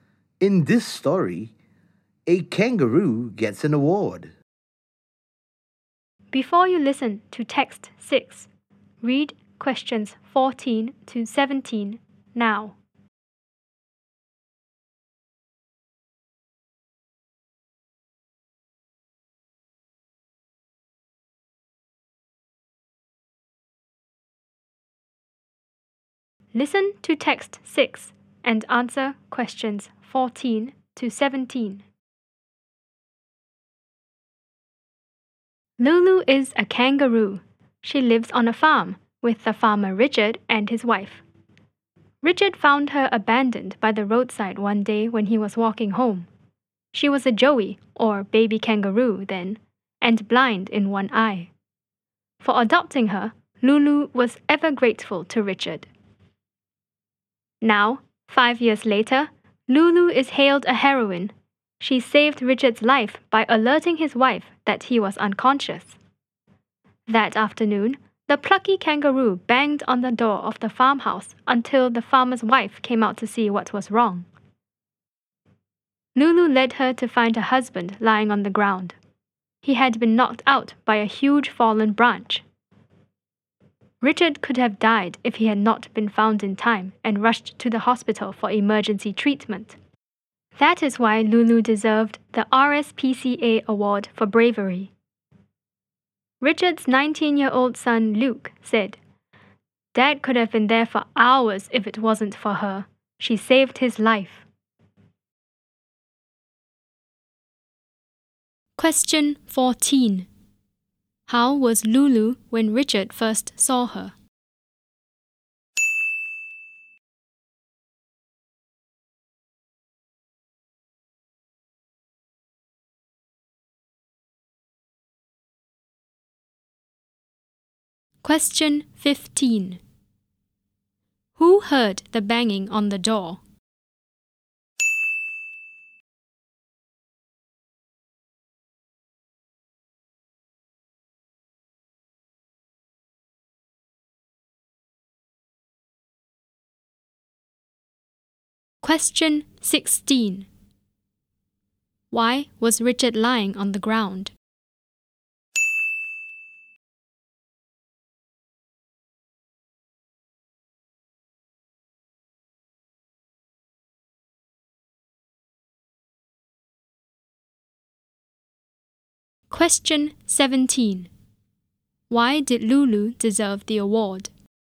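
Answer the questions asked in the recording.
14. Abandoned by the roadside, a baby kangaroo blind in one eye
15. Richard's wife (the farmer's wife)
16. He had been knocked out by a huge fallen branch
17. She saved Richard's life by alerting his wife that he was unconscious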